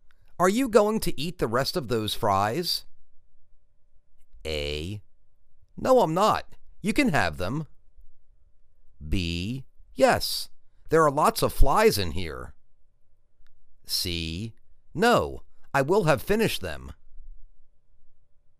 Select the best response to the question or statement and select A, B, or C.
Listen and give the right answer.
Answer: No I'm not. You can have them.